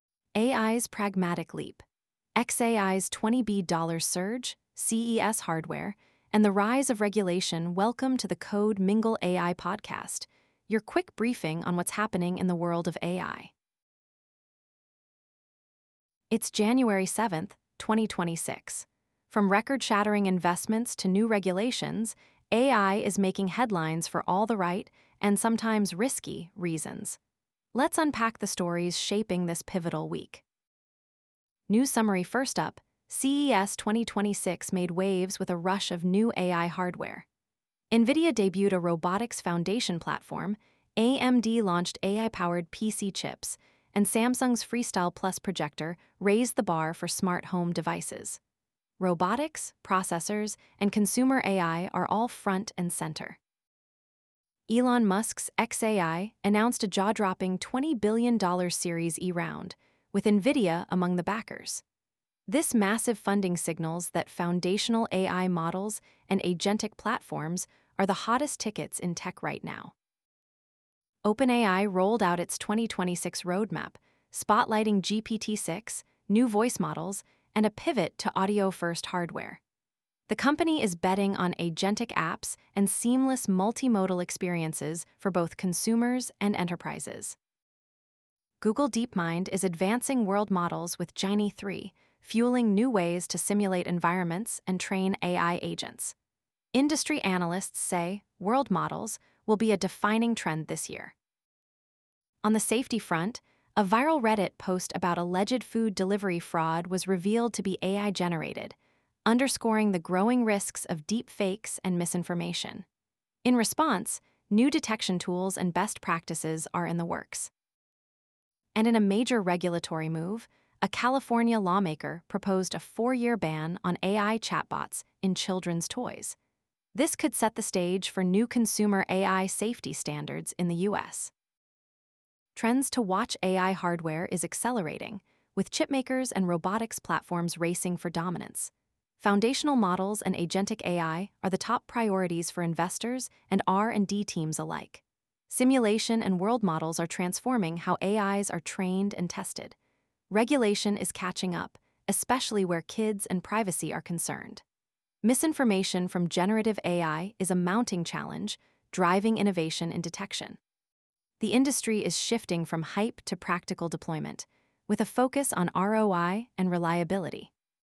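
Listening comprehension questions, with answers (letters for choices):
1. What major funding event signaled intense investor interest in foundational AI and agent platforms in early 2026?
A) OpenAI's $10B Series D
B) xAI's $20B Series E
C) Anthropic's $15B Series F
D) Google DeepMind's $18B IPO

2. Which company unveiled a full-stack robotics foundation platform at CES 2026?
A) AMD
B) Samsung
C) Nvidia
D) Razer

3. What is a key focus of OpenAI's 2026 roadmap?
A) Developing AI-powered projectors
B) Launching Genie 3 world models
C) Advancing GPT-6 and audio-based hardware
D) Banning AI chatbots in toys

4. What recent incident highlighted the risks of AI-generated misinformation?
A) A fake AI-powered projector launch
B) A viral Reddit post about food delivery fraud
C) A chatbot malfunction at CES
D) A failed AI chip demonstration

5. What regulatory action did a California lawmaker propose regarding AI in children's toys?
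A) Mandating AI education in schools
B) Requiring open-source AI models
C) Banning AI chatbots in toys for four years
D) Subsidizing AI-powered toys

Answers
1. B
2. C
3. C
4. B
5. C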